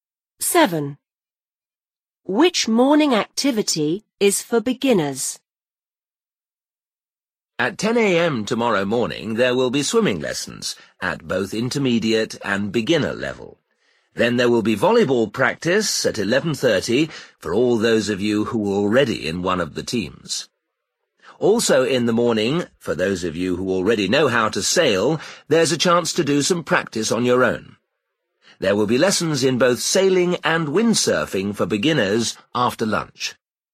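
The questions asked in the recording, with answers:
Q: Which morning activity is for beginners?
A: Swimming lessons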